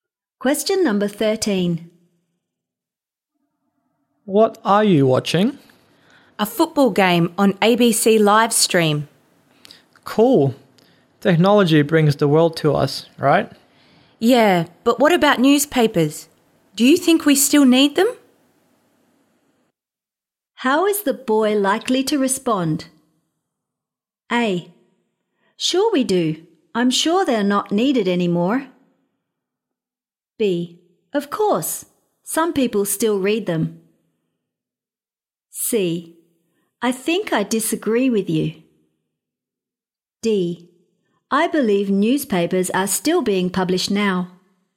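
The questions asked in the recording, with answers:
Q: How is the boy likely to respond?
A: B: Of course. Some people still read them.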